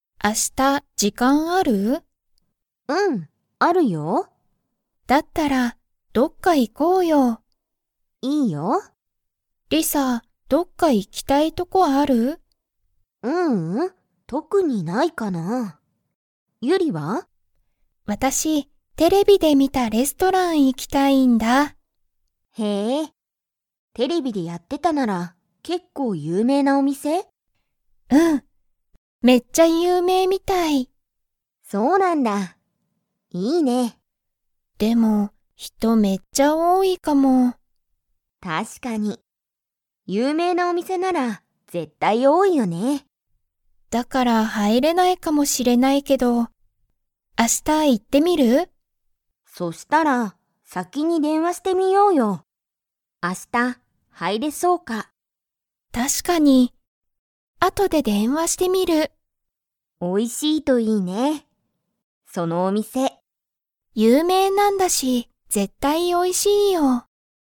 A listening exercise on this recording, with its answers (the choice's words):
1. リサは、どっか行(い)きたいところがありますか?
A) はい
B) いいえ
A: いいえ

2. ユリは、後(あと)で____。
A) レストランに行(い)ってみる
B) 電話(でんわ)してみる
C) テレビを見(み)たい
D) 有名(ゆうめい)になりたい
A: 電話(でんわ)してみる